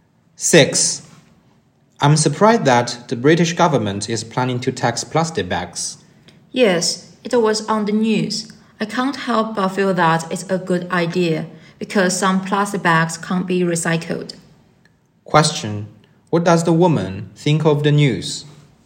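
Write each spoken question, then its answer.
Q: What does the woman think of the news?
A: It's a good idea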